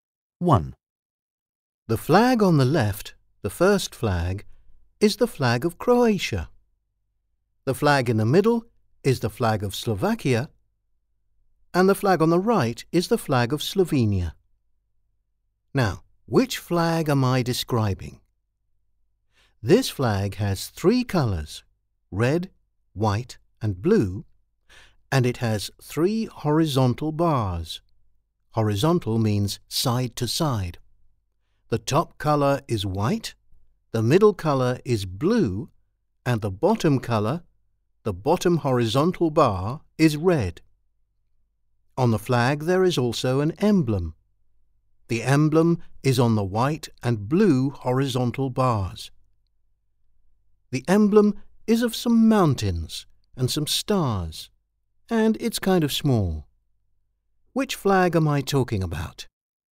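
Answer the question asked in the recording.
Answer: C: the flag of Slovenia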